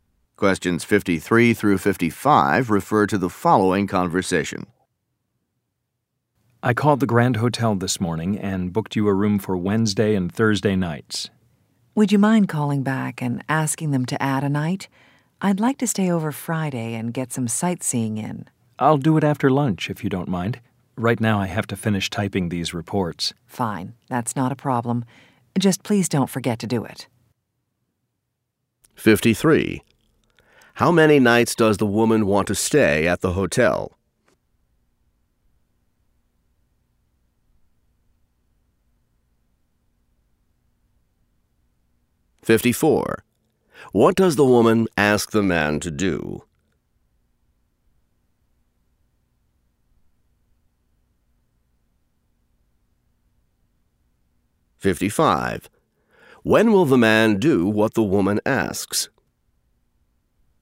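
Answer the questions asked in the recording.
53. Three
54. Call the hotel to add a night
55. After lunch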